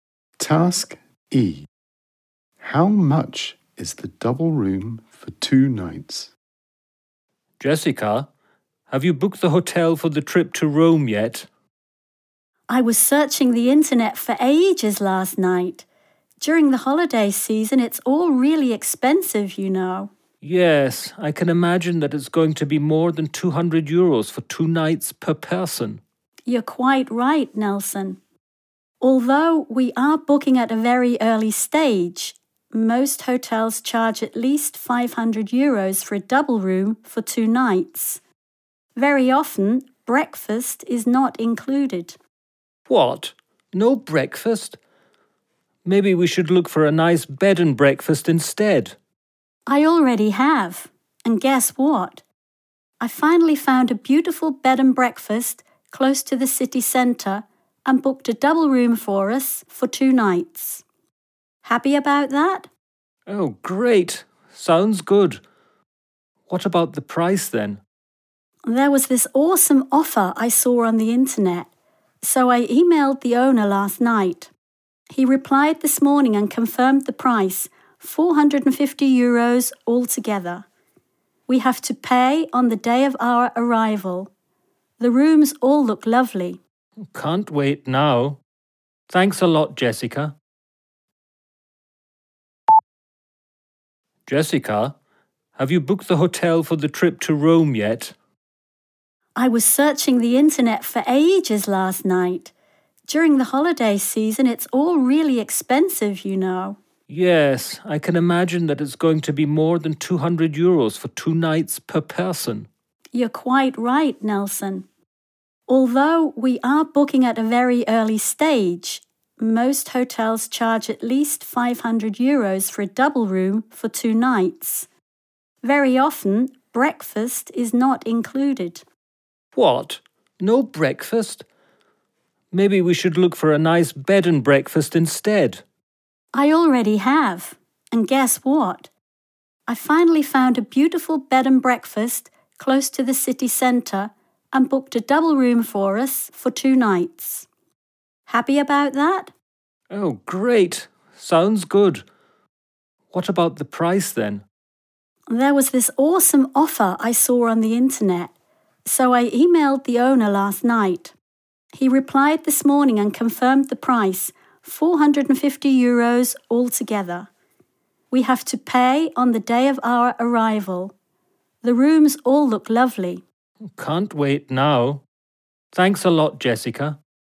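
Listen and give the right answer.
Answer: 450 euros altogether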